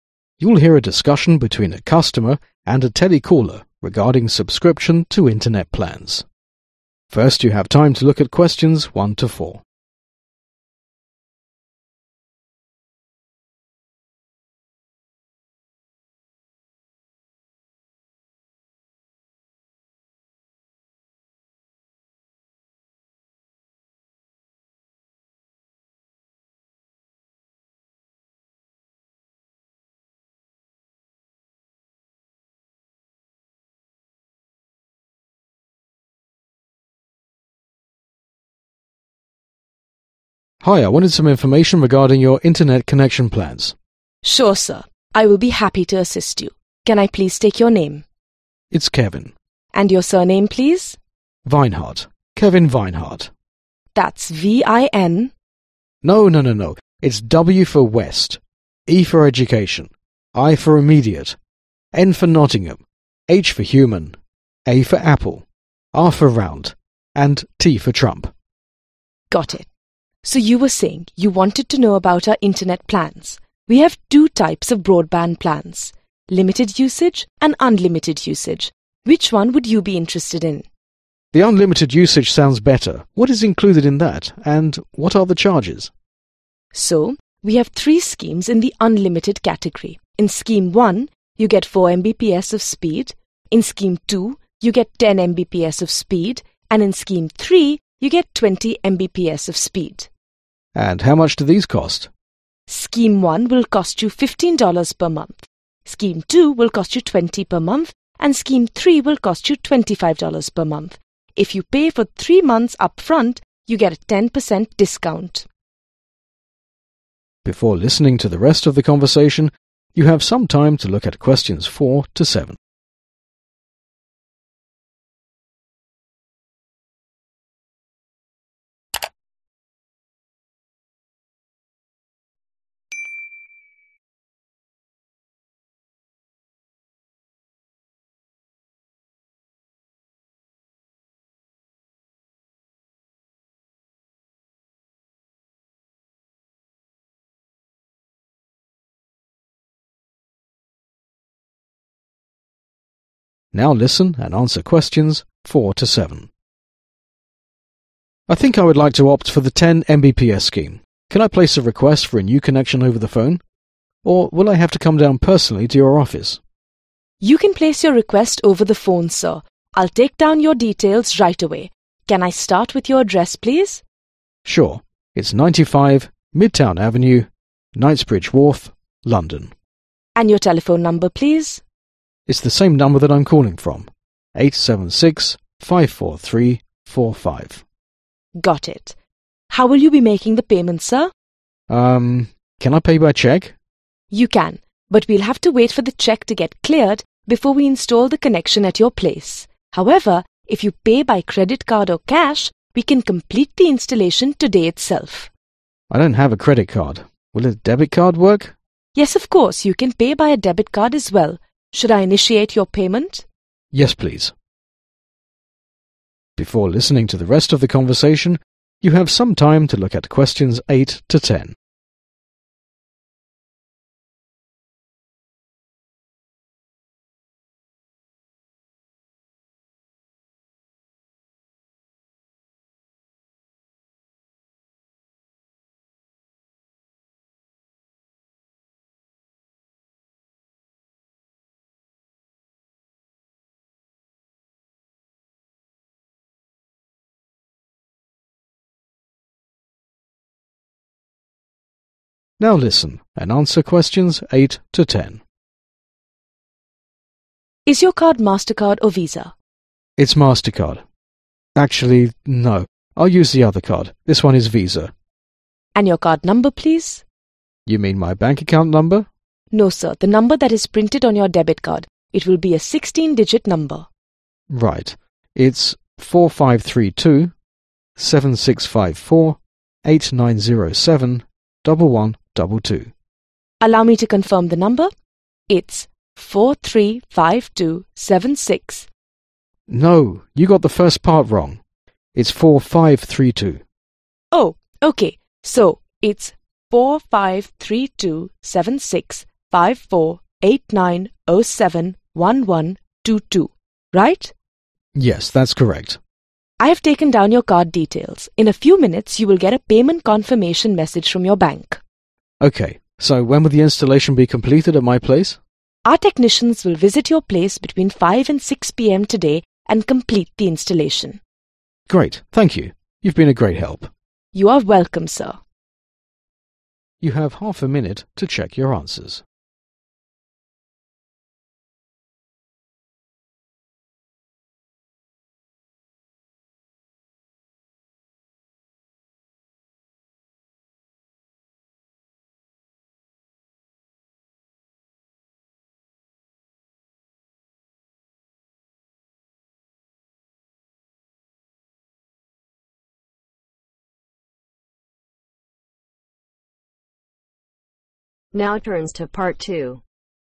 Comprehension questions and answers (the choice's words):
Circle the correct letter.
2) The two types of available internet plans are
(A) Broadband and dial up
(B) Broadband and unlimited usage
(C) Limited usage and unlimited usage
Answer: Limited usage and unlimited usage

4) the caller can a request for a new connection .................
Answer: OVER THE PHONE

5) The caller's telephone number is ..................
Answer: 87654345

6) The advantage of paying by credit card or cash is that the installation can be done ...................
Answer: THE SAME DAY

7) The customer wishes to pay using a .................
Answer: DEBIT CARD

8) The two card options provided by the customer support representative are ..............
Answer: MASTER CARD OF VISA

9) The caller's credit card number is ................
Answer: 4532 7654 8907 1122

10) The installation of the connection will be completed between ................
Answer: 5 and 6 pm